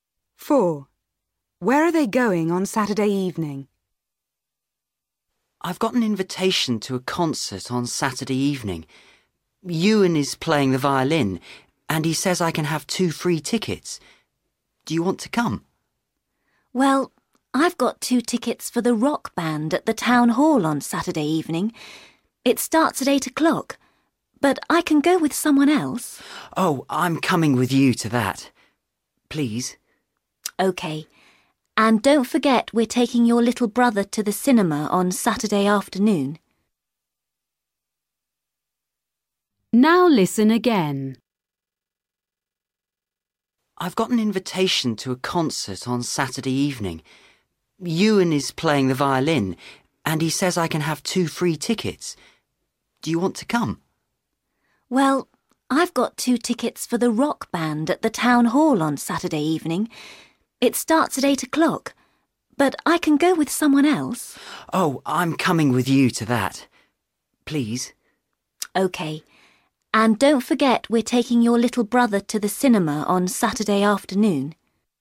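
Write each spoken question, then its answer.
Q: Where are they going on Saturday evening?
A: To the rock band concert at the Town Hall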